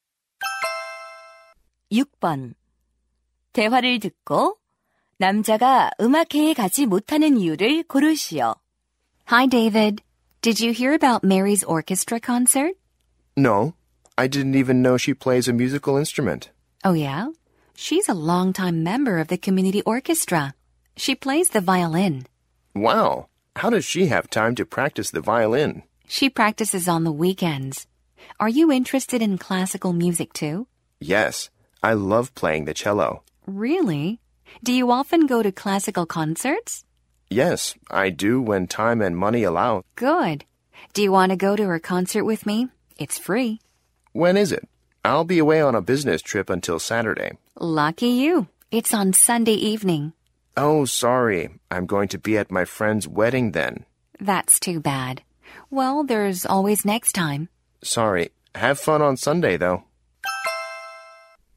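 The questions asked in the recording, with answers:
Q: 대화를 듣고 남자가 음악회에 가지 못하는 이유를 고르시오.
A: 친구 결혼식에 가야 해서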